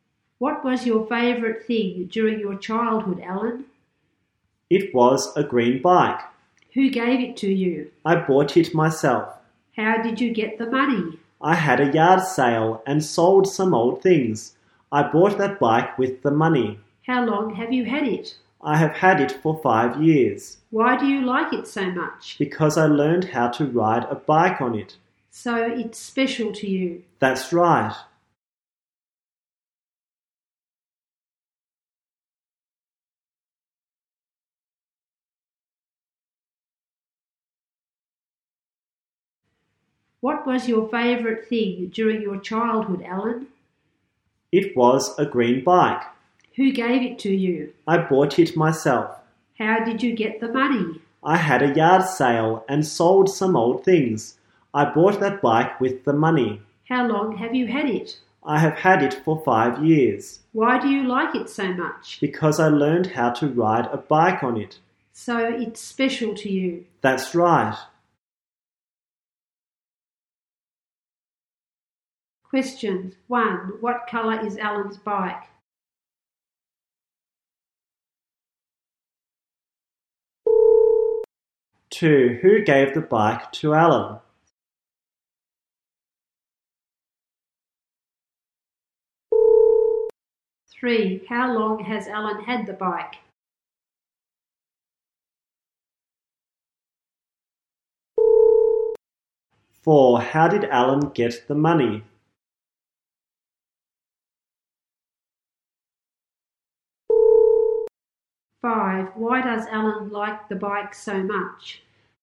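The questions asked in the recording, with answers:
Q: What colour is Alan's bike?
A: Green

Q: Who gave the bike to Alan?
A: Nobody; he bought it himself

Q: How long has Alan had the bike?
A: For 5 years

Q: How did Alan get the money?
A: He had a yard sale and sold some old things

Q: Why does Alan like the bike so much?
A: He learned how to ride a bike on it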